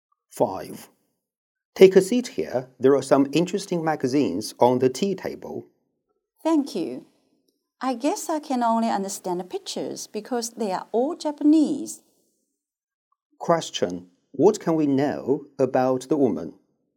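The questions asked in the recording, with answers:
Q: What can we know about the woman?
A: She can't read Japanese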